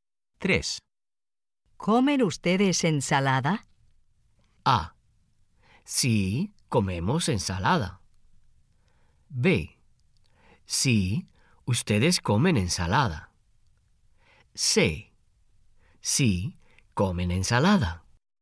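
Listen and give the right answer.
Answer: A: Sí, comemos ensalada.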